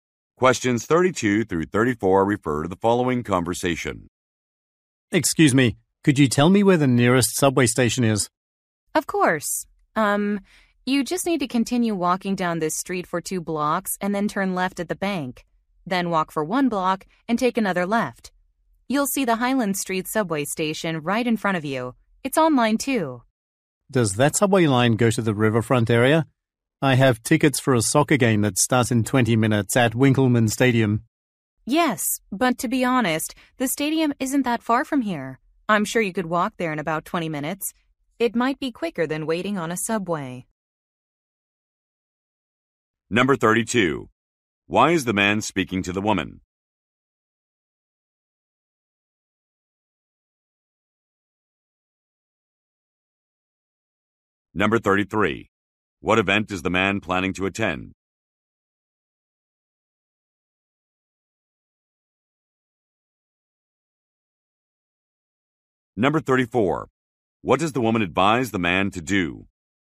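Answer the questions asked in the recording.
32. To ask for directions to the nearest subway station
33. A soccer game
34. Walk to the stadium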